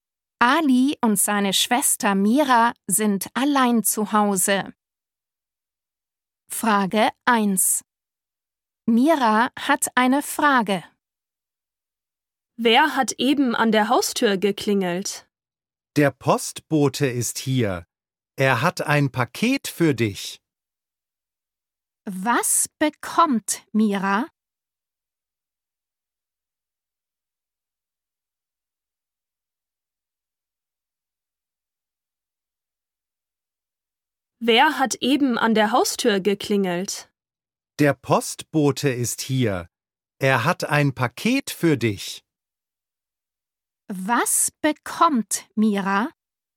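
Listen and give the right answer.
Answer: ein Paket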